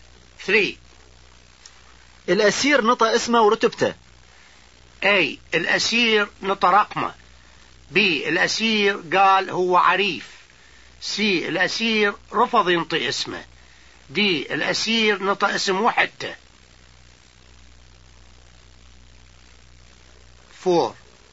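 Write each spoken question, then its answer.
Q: الأسير نطى اسمه ورتبته.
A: B: الأسير قال هو عريف.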